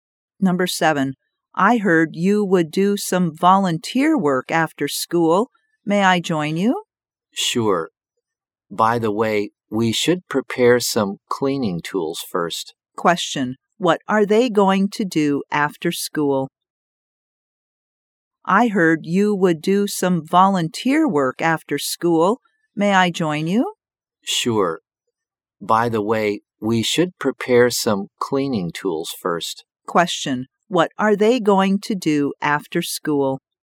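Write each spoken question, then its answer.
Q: What are they going to do after school?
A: Do some volunteer cleaning work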